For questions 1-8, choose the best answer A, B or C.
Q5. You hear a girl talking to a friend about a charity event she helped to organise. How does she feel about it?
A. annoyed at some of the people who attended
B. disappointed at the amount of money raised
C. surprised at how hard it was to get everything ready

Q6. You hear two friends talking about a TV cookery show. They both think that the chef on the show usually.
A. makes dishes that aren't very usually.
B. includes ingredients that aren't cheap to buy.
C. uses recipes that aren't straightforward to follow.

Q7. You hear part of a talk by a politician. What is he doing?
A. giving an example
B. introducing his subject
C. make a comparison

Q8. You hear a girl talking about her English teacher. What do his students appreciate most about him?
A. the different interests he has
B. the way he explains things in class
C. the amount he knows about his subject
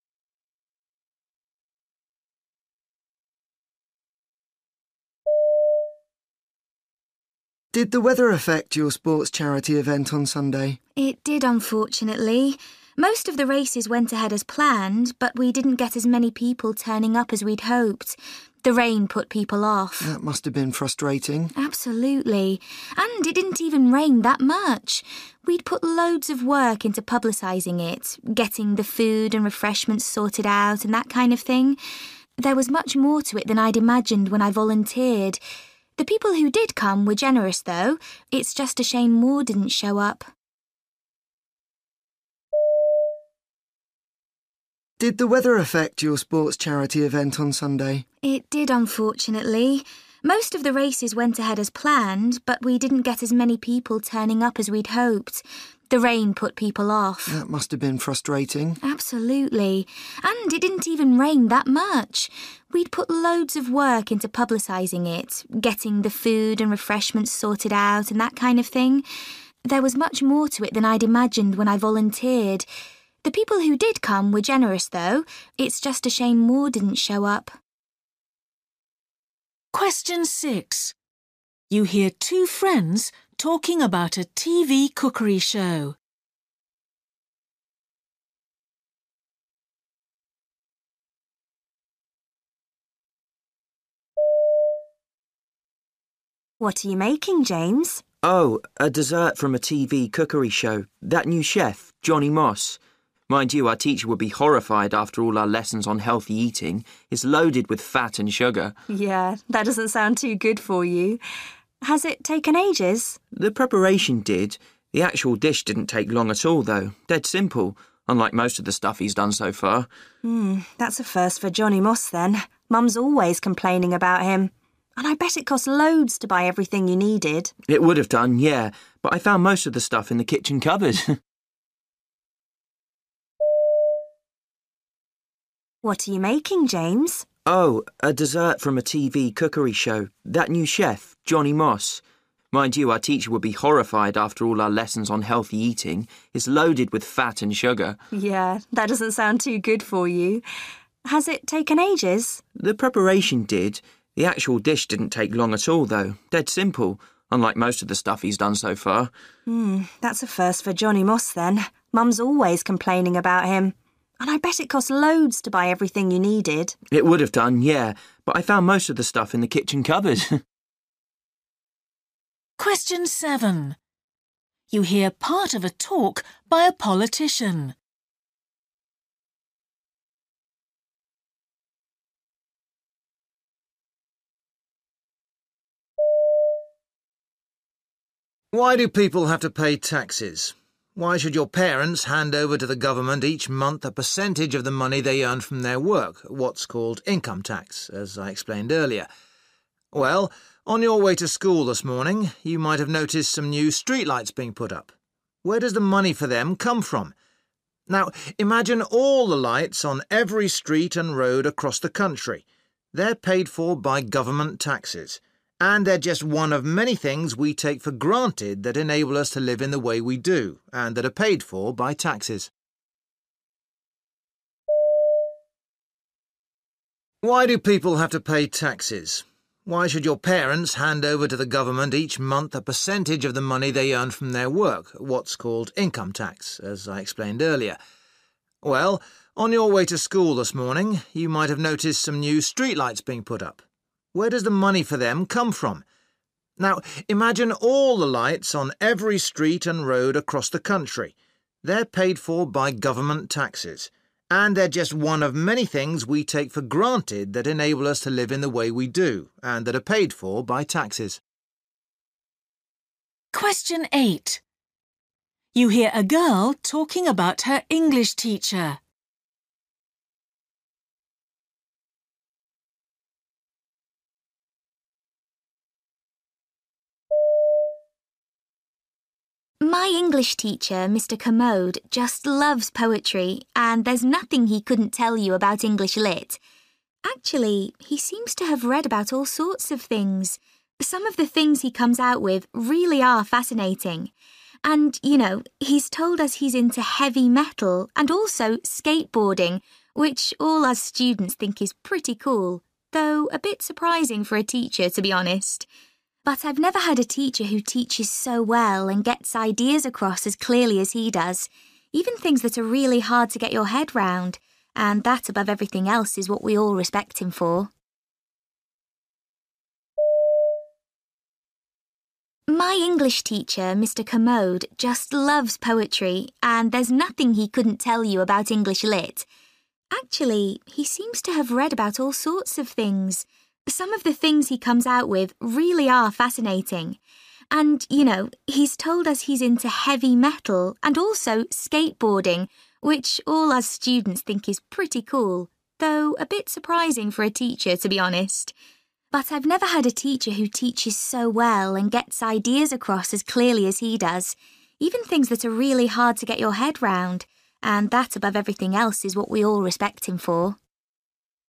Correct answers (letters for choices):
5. C
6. C
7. A
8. B

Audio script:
Boy: Did the weather affect your sports charity event on Sunday?
Girl: It did, unfortunately. Most of the races went ahead as planned, but we didn't get as many people turning up as we'd hoped. The rain put people off.
Boy: That must've been frustrating.
Girl: Absolutely. And, it didn't even rain that much. We'd put loads of work into publicising it, getting the food and refreshments sorted out and that kind of thing. There was much more to it than I'd imagined when I volunteered. The people who did come were generous, though. It's just a shame more didn't show up.
6
Girl: What're you making, James?
James: Oh, a dessert from a TV cookery show – that new chef, Johnny Moss. Mind you, our teacher would be horrified after all our lessons on healthy eating. It's loaded with fat and sugar.
Girl: Yeah, that doesn't sound too good for you. Has it taken ages?
James: The preparation did – the actual dish didn't take long at all though, dead simple, unlike most of the stuff he's done so far.
Girl: Mm, that's a first for Johnny Moss, then. Mum's always complaining about him. And I bet it cost loads to buy everything you needed.
James: It would've done, yeah, but I found most of the stuff in the kitchen cupboard!
Politician: Why do people have to pay taxes? Why should your parents hand over to the government each month a percentage of the money they earn from their work – what's called income tax, as I explained earlier? Well, on your way to school this morning, you might've noticed some new street lights being put up. Where does the money for them come from? Now, imagine all the lights on every street and road across the country – they're paid for by government taxes. And they're just one of many things we take for granted that enable us to live in the way we do, and that are paid for by taxes.
8
Girl: My English teacher, Mr Kermode, just loves poetry and there's nothing he couldn't tell you about English lit! Actually, he seems to have read about all sorts of things – some of the things he comes out with really are fascinating. And, you know, he's told us he's into heavy metal and also skateboarding, which all us students think is pretty cool, though a bit surprising for a teacher, to be honest. But I've never had a teacher who teaches so well and gets ideas across as clearly as he does, even things that are really hard to get your head round – and that, above everything else, is what we all respect him for.